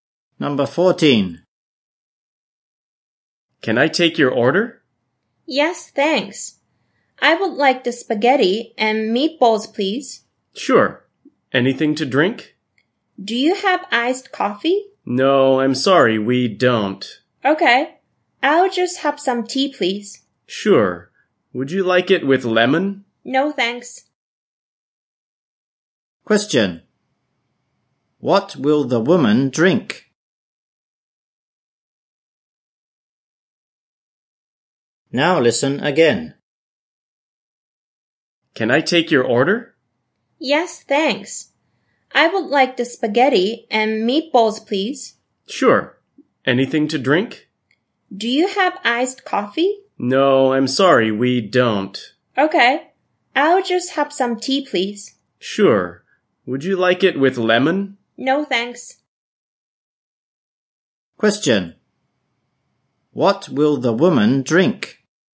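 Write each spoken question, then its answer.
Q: What will the woman drink?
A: Tea without lemon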